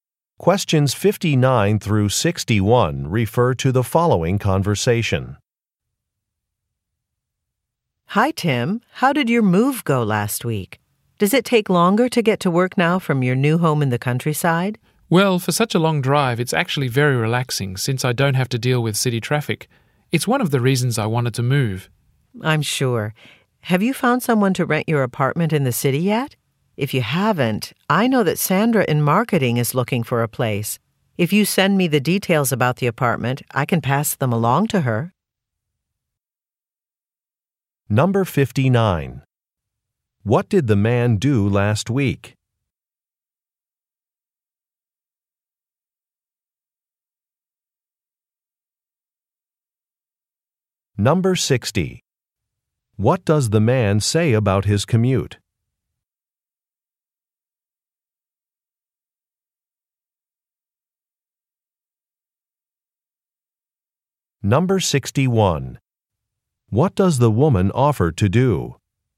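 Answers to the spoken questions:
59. He moved to a new home
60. It is long but relaxing
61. Pass his apartment details to a colleague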